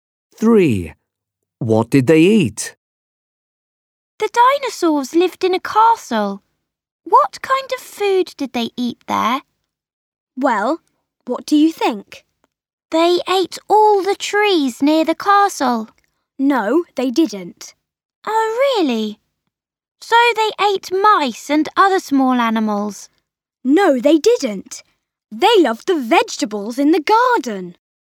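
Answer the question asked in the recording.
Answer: The vegetables in the garden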